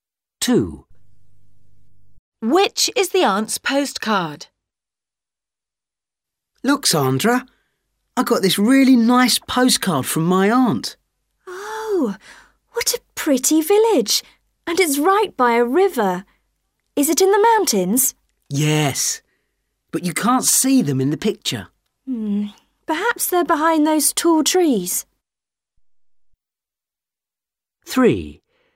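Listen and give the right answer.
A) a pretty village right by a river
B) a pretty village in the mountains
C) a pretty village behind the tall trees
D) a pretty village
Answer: A) a pretty village right by a river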